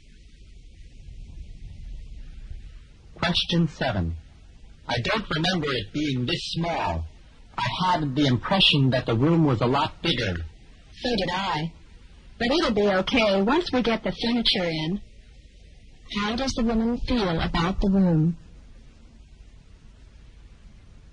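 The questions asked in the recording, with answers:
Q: How does the woman feel about the room?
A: It is smaller than she remembered, but it will be okay once the furniture is in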